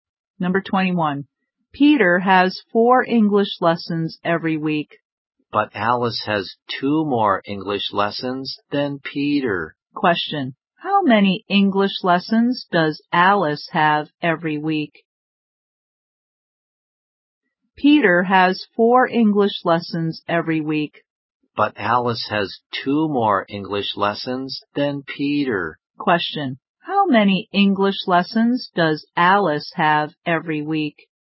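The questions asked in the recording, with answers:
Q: How many English lessons does Alice have every week?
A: Six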